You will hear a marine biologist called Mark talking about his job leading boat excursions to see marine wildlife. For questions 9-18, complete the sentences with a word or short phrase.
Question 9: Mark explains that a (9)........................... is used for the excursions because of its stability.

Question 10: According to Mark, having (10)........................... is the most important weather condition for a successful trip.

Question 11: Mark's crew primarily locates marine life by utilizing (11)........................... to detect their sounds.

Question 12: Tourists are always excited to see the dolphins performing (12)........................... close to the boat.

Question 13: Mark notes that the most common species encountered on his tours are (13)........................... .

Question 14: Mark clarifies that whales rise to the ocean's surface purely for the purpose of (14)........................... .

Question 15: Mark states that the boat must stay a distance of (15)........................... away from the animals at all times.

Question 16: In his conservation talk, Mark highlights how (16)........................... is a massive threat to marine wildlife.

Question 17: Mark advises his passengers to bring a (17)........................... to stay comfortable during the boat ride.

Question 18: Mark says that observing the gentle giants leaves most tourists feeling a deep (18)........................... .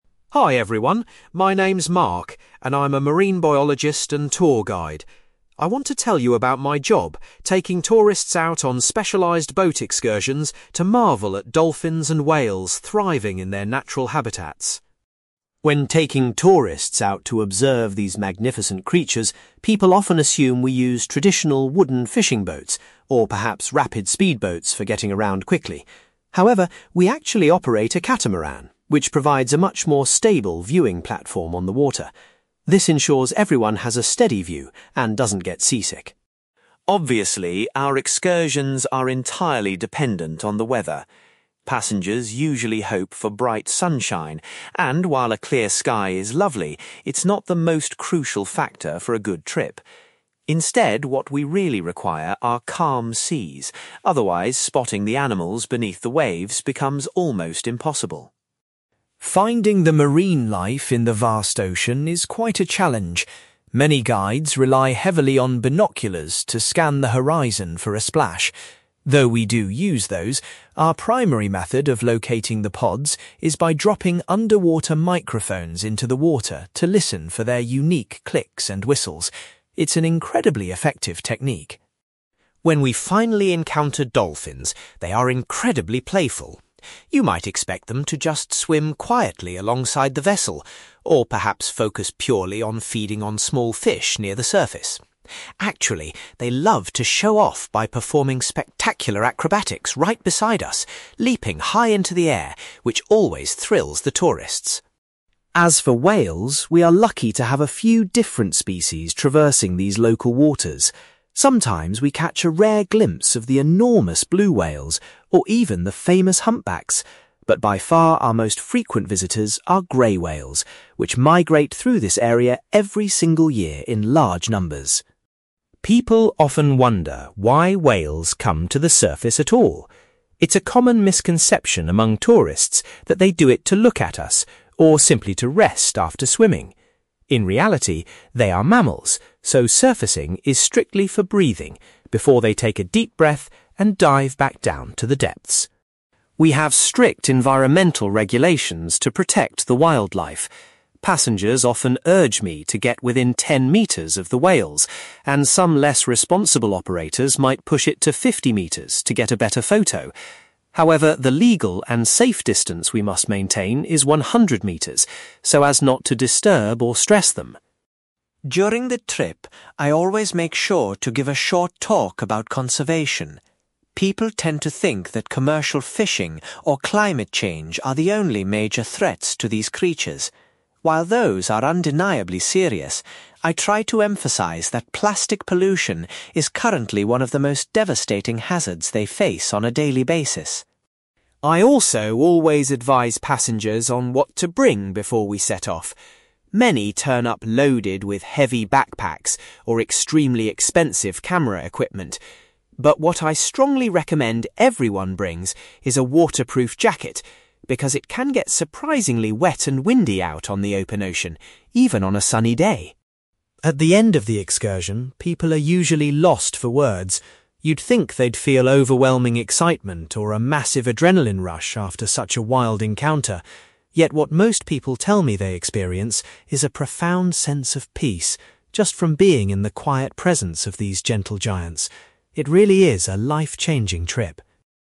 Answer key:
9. catamaran
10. calm seas
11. underwater microphones
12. acrobatics
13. grey whales
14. breathing
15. 100 metres
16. plastic pollution
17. waterproof jacket
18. sense of peace

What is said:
Mark: Hi everyone, my name is Mark, and I'm a marine biologist and tour guide. I want to tell you about my job, taking tourists out on specialized boat excursions to marvel at dolphins and whales thriving in their natural habitats.
When taking tourists out to observe these magnificent creatures, people often assume we use traditional wooden fishing boats, or perhaps rapid speedboats for getting around quickly. However, we actually operate a catamaran, which provides a much more stable viewing platform on the water. This ensures everyone has a steady view and doesn't get seasick.
Obviously, our excursions are entirely dependent on the weather. Passengers usually hope for bright sunshine, and while a clear sky is lovely, it's not the most crucial factor for a good trip. Instead, what we really require are calm seas, otherwise spotting the animals beneath the waves becomes almost impossible.
Finding the marine life in the vast ocean is quite a challenge. Many guides rely heavily on binoculars to scan the horizon for a splash. Though we do use those, our primary method of locating the pods is by dropping underwater microphones into the water to listen for their unique clicks and whistles. It's an incredibly effective technique.
When we finally encounter dolphins, they are incredibly playful. You might expect them to just swim quietly alongside the vessel, or perhaps focus purely on feeding on small fish near the surface. Actually, they love to show off by performing spectacular acrobatics right beside us, leaping high into the air, which always thrills the tourists.
As for whales, we are lucky to have a few different species traversing these local waters. Sometimes we catch a rare glimpse of the enormous blue whales, or even the famous humpbacks. But by far our most frequent visitors are grey whales, which migrate through this area every single year in large numbers.
People often wonder why whales come to the surface at all. It's a common misconception among tourists that they do it to look at us, or simply to rest after swimming. In reality, they are mammals, so surfacing is strictly for breathing, before they take a deep breath and dive back down to the depths.
We have strict environmental regulations to protect the wildlife. Passengers often urge me to get within ten metres of the whales, and some less responsible operators might push it to fifty metres to get a better photo. However, the legal and safe distance we must maintain is 100 metres, so as not to disturb or stress them.
During the trip, I always make sure to give a short talk about conservation. People tend to think that commercial fishing or climate change are the only major threats to these creatures. While those are undeniably serious, I try to emphasize that plastic pollution is currently one of the most devastating hazards they face on a daily basis.
I also always advise passengers on what to bring before we set off. Many turn up loaded with heavy backpacks or extremely expensive camera equipment. But what I strongly recommend everyone brings is a waterproof jacket, because it can get surprisingly wet and windy out on the open ocean, even on a sunny day.
At the end of the excursion, people are usually lost for words. You'd think they'd feel overwhelming excitement or a massive adrenaline rush after such a wild encounter. Yet, what most people tell me they experience is a profound sense of peace, just from being in the quiet presence of these gentle giants. It really is a life-changing trip.

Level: B2